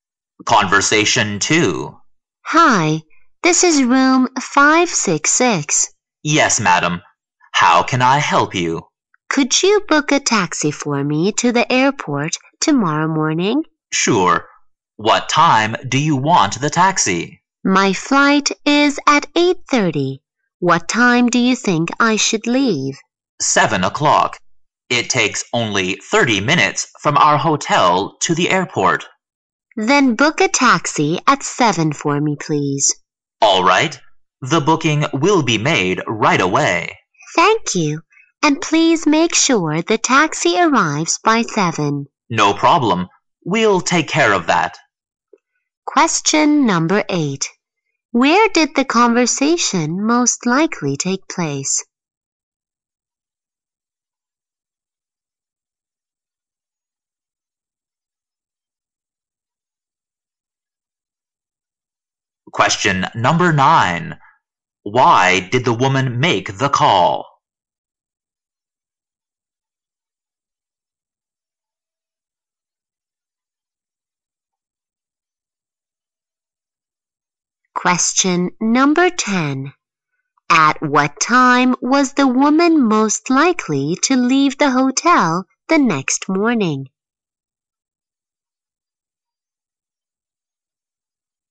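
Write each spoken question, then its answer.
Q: Question number 8. Where did the conversation most likely take place?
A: In a hotel

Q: Question number 9. Why did the woman make the call?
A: To book a taxi to the airport

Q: Question number 10. At what time was the woman most likely to leave the hotel the next morning?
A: At 7 o'clock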